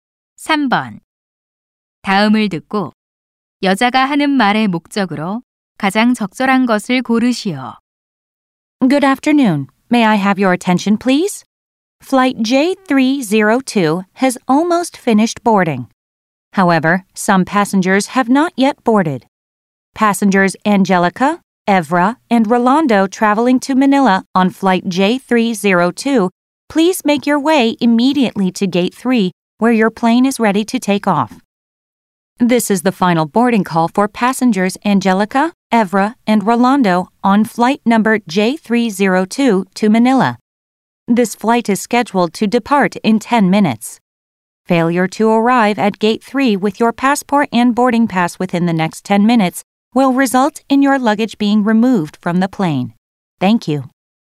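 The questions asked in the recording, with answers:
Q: 다음을 듣고 여자가 하는 말의 목적으로 가장 적절한 것을 고르시오.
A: J302편 승객들에게 최종 탑승을 안내하려고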